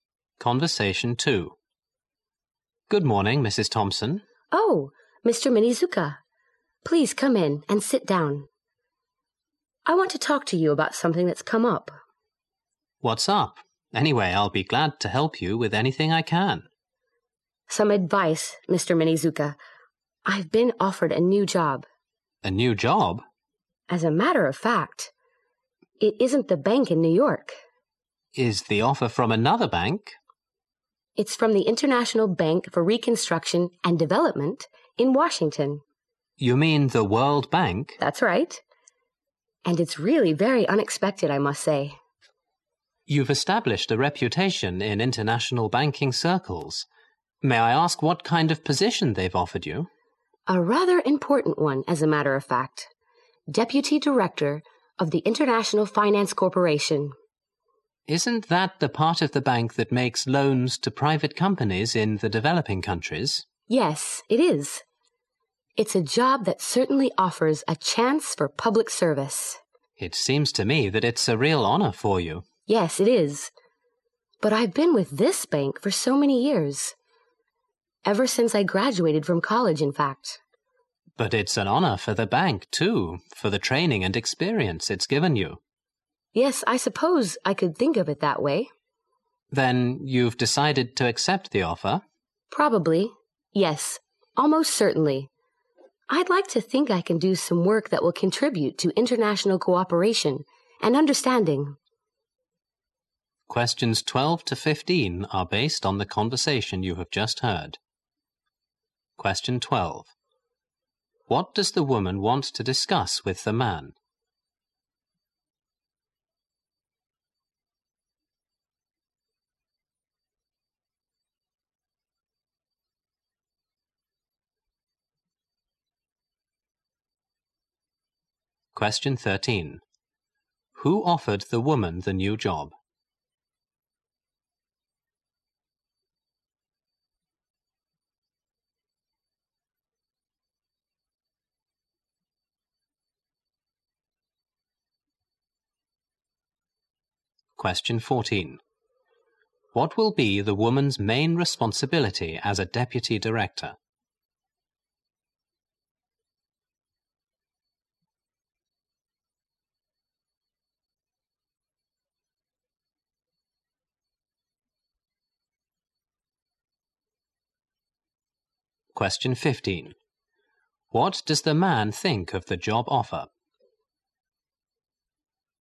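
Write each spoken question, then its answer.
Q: What does the woman want to discuss with the man?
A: A new job offer she received

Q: Who offered the woman the new job?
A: The World Bank (International Bank for Reconstruction and Development)

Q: What will be the woman's main responsibility as a deputy director?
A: Making loans to private companies in developing countries

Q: What does the man think of the job offer?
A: It is a real honor for her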